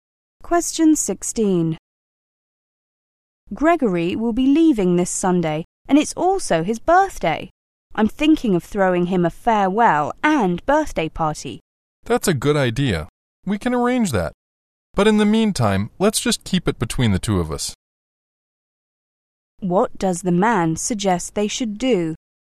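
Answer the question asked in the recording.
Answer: Keep the party a secret between the two of them.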